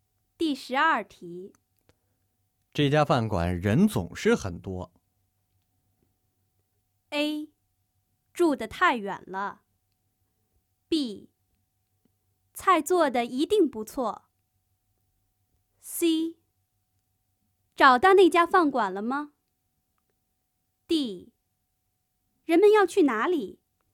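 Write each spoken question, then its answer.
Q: 这家饭馆人总是很多。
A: B: 菜做的一定不错。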